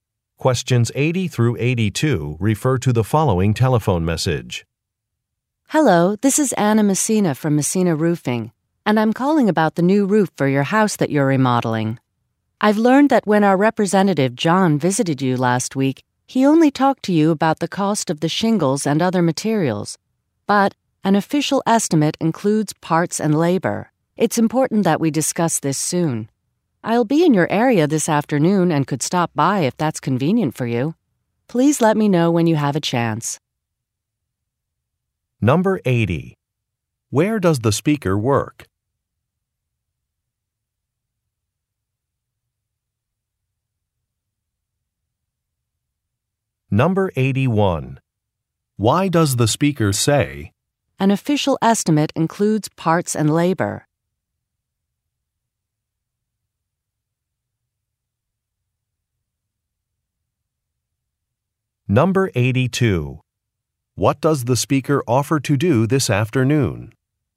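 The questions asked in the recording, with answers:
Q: Where does the speaker work?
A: At a roofing company

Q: What does the speaker offer to do this afternoon?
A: Stop by the listener's house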